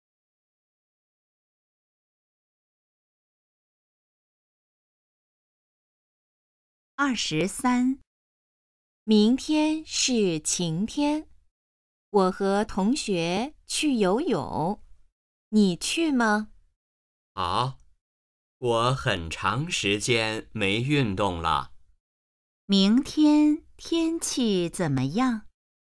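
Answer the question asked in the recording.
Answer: 晴天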